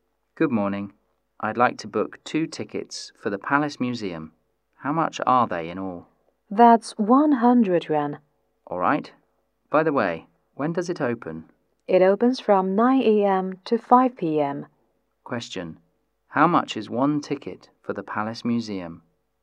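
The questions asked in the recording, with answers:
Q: How much is 1 ticket for the Palace Museum?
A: 50 yuan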